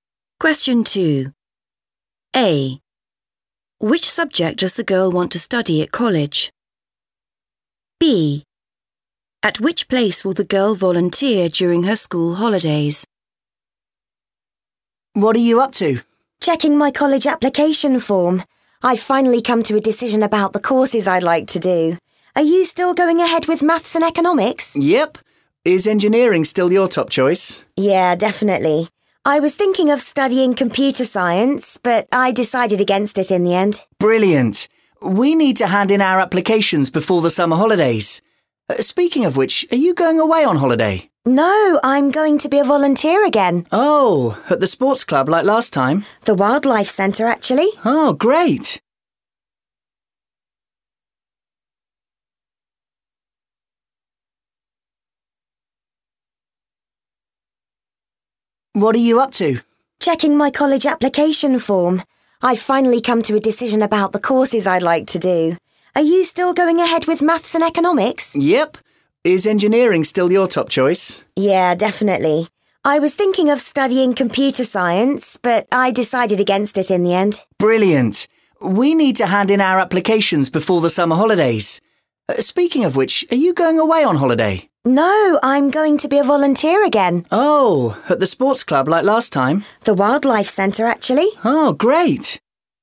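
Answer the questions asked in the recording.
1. engineering
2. the Wildlife Centre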